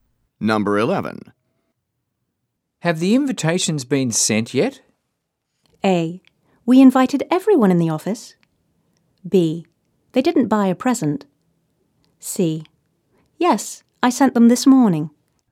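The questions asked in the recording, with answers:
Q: Have the invitations been sent yet?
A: C: Yes, I sent them this morning.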